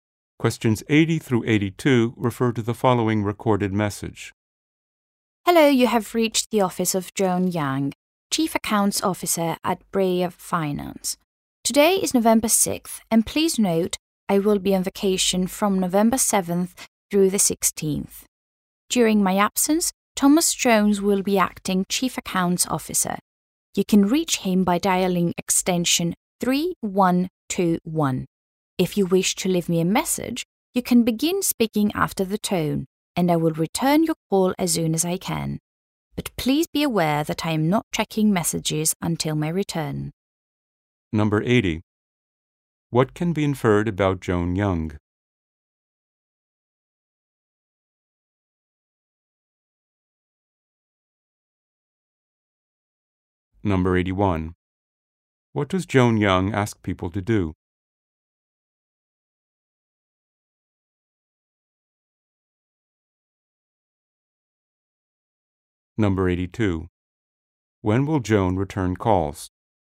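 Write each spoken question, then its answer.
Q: When will Joan return calls?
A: After she returns from vacation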